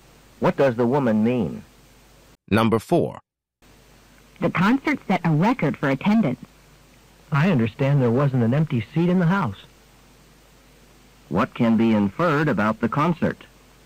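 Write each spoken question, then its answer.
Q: What can be inferred about the concert?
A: It was sold out; every seat was full.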